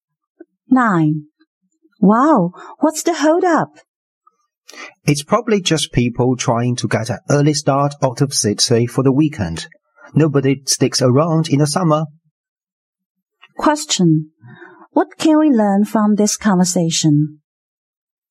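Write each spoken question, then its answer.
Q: What can we learn from this conversation?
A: There is a traffic jam as people leave the city for the weekend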